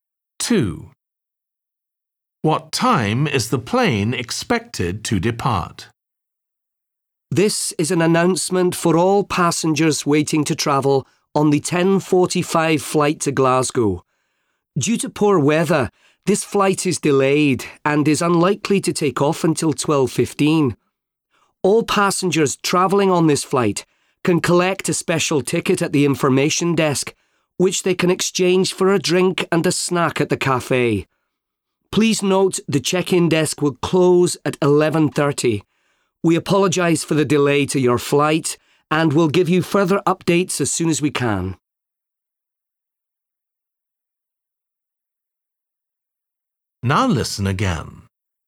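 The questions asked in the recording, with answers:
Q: What time is the plane expected to depart?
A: 12:15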